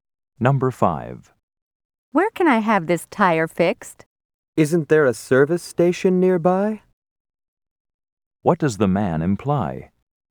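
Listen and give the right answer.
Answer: The tire can be fixed at a service station nearby.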